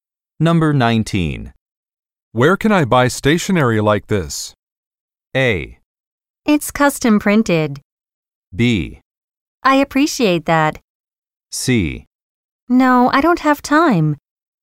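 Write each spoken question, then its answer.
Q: Where can I buy stationery like this?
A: A: It's custom printed.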